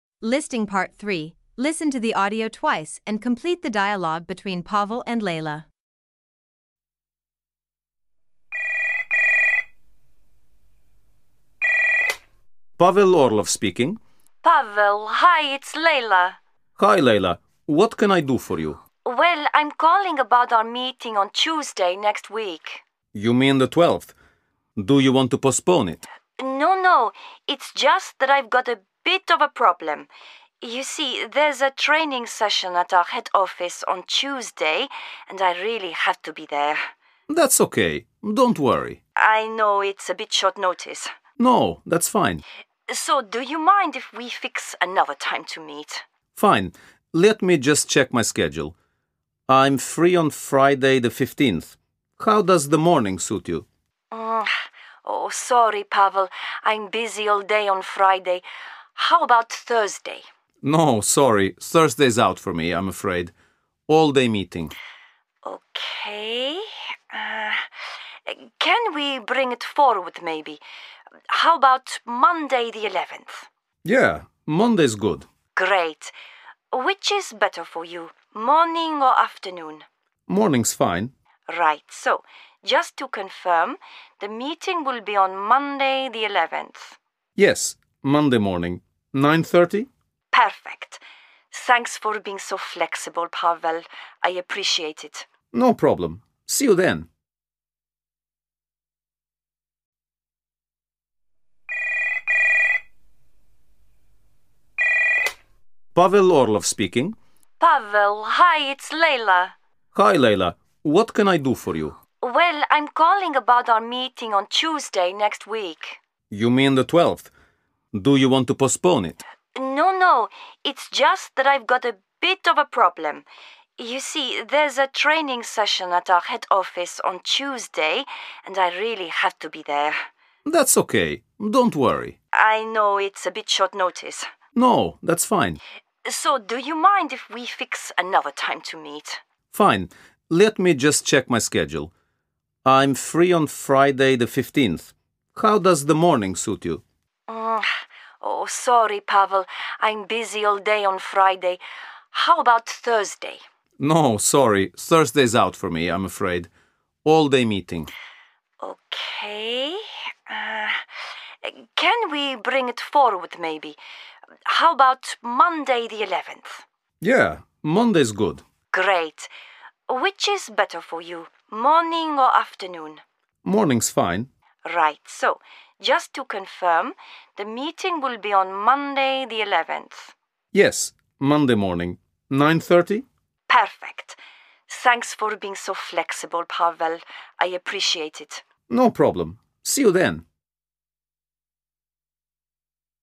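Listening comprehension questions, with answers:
Part 3: Listen to the audio twice and complete the dialogue between Pavel and Laila ( 2pts)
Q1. L: Well, (1) our meeting on Tuesday next week.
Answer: I'm calling about

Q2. Do you want (2) ?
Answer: to postpone it

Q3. L: I know it's a bit(3) .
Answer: short notice

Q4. L: So(4) we fix another time to meet?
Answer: do you mind if

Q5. P: Fine. Let me just (5) morning suit you?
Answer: check my schedule

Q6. P: No, sorry, Thursday's(6) , I'm afraid.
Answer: out for me

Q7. L: OK... Um, can we bring(7) , maybe?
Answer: it forward

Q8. L: Great.(8) for you: morning or afternoon?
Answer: Which is better

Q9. L: Right. So just(9) :the meeting will be on Monday the 11th.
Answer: to confirm

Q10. L: Perfect. Thanks for being(10) , Pavel.I appreciate it.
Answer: so flexible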